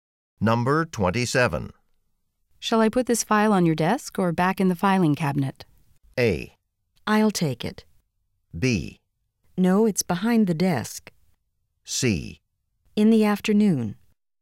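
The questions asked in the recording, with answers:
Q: Shall I put this file on your desk or back in the filing cabinet?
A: A: I'll take it.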